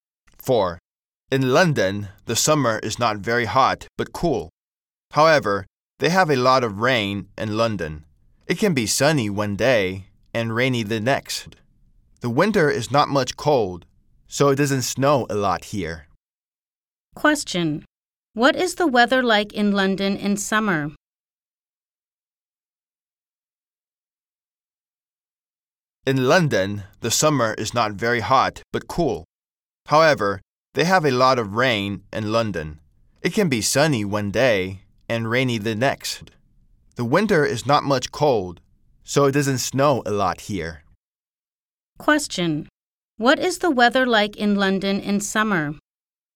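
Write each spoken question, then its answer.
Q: What is the weather like in London in summer?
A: Not very hot, but cool.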